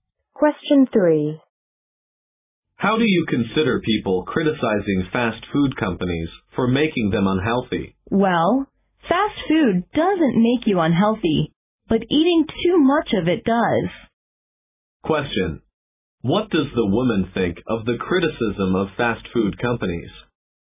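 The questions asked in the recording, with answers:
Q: What does the woman think of the criticism of fast food companies?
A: It is unfair: eating too much fast food, not fast food itself, makes people unhealthy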